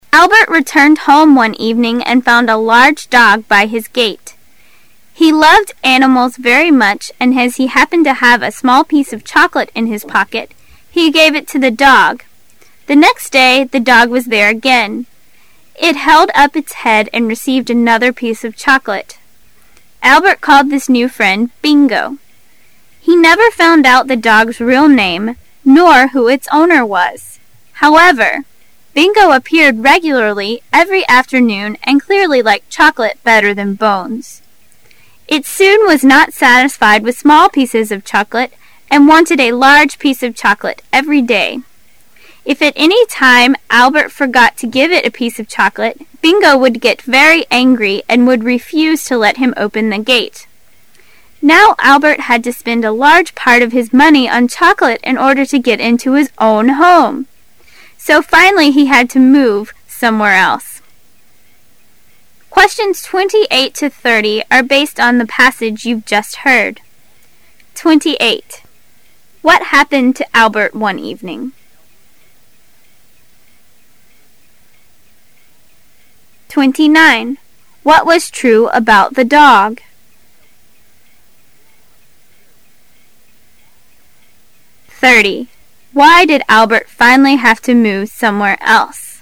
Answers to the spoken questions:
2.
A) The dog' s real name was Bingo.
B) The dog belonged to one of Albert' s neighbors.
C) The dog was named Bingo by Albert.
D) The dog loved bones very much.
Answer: C) The dog was named Bingo by Albert.
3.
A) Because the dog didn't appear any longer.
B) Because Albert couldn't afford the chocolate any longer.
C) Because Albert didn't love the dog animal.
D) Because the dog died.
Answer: B) Because Albert couldn't afford the chocolate any longer.

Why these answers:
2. 该题需核实关于这条狗的评述。听时把握关键词,called his new friend "Bingo",由此可确定正确答案为C。
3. 该题询问事件原因。听时把握关键词spend a large part of his money on...由此可推知与钱有关,因此选择选项B。

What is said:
[解析] 28-30 Albert returned home one evening and found a large dog by his gate. He loved animals very much and as he happened to have a small piece of chocolate in his pocket, he gave it to the dog. The next day, the dog was there again. It held up its head and received another piece of chocolate. Albert called his new friend" Bingo". He never found out the dog's real name, nor who its owner was. However, Bingo appeared regularly every afternoon and clearly liked chocolate better than bones. It soon was not satisfied with small pieces of chocolate and wanted a large piece of chocolate every day. If at any time Albert forgot to give it a piece of chocolate, Bingo would get very angry and would refuse to let him open the gate. Now Albert had to spend a large part of his money on chocolate in order to get into his own home! So finally he had to move somewhere else. What happened to Albert one evening?